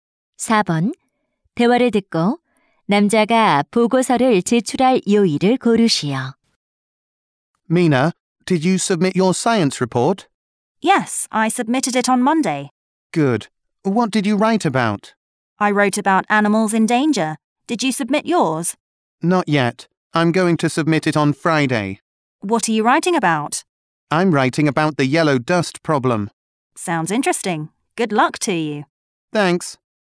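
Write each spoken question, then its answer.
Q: 4번. 대화를 듣고 남자가 보고서를 제출할 요일을 고르시오.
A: 금요일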